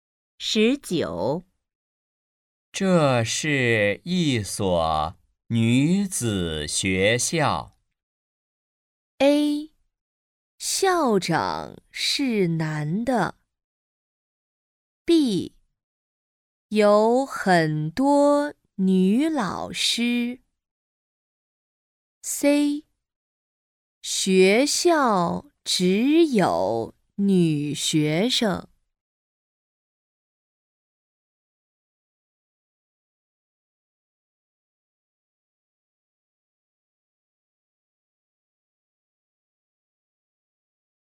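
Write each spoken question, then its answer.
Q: 这是一所女子学校。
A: C: 学校只有女学生。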